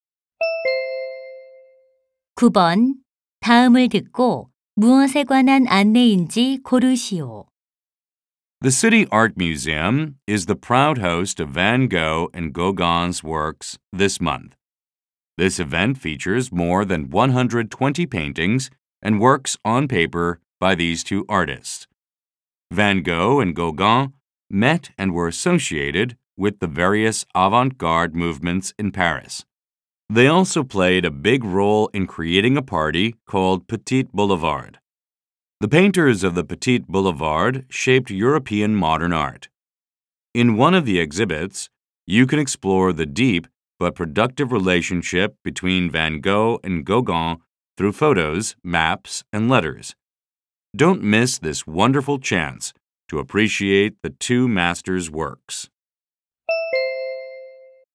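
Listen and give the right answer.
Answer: 반 고흐와 고갱 작품 전시회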